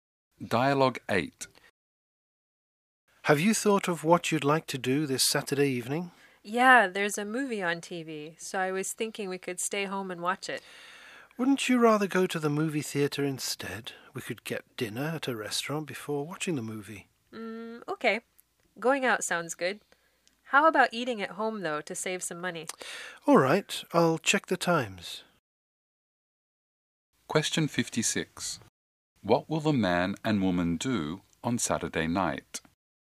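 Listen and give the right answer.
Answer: Eat dinner at home, then go to see a movie at the theater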